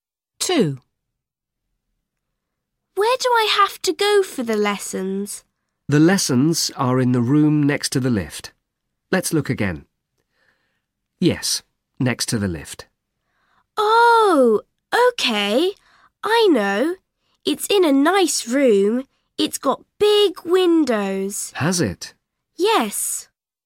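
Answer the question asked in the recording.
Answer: the room next to the lift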